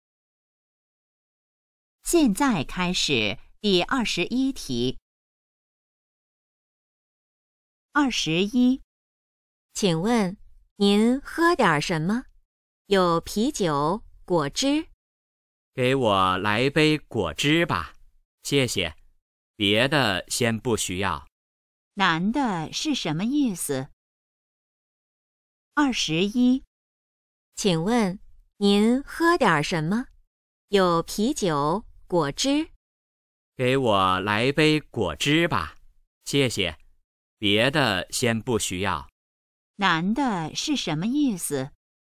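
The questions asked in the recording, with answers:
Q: 男的是什么意思?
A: 要一杯果汁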